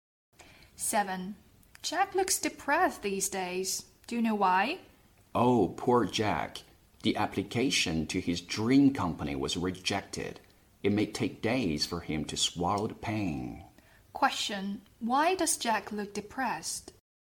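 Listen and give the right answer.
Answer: His application to his dream company was rejected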